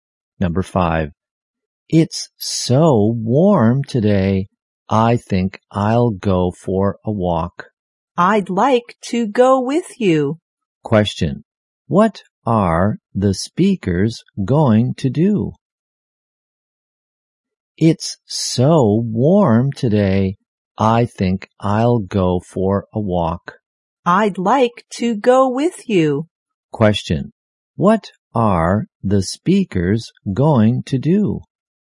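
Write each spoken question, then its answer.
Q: Question, what are the speakers going to do?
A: Go for a walk.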